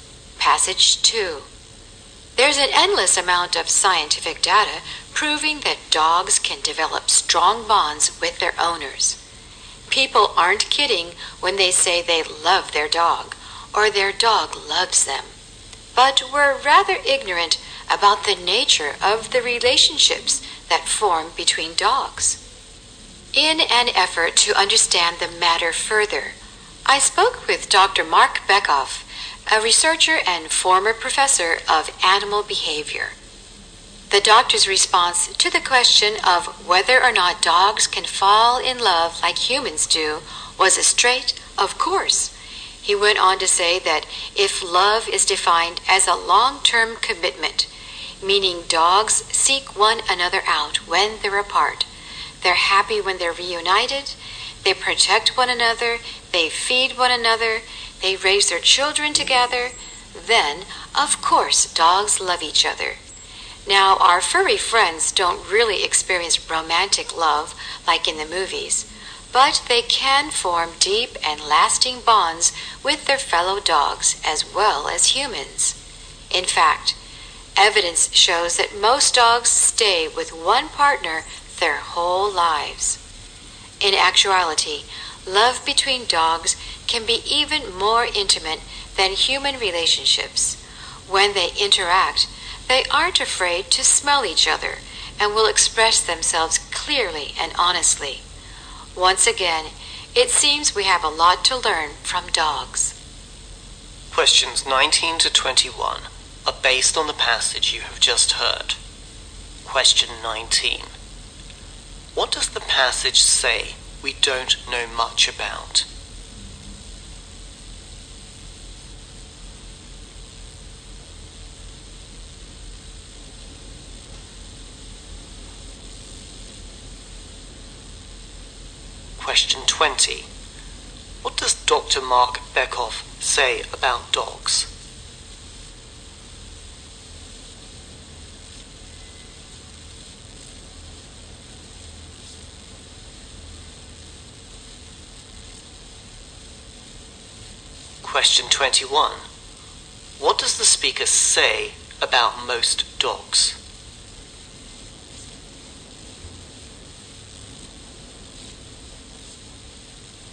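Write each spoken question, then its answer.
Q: What does the passage say we don't know much about?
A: The nature of relationships between dogs.

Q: What does Dr. Mark Beckhoff say about dogs?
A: Dogs can fall in love with each other.

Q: What does the speaker say about most dogs?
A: They stay with one partner their whole lives.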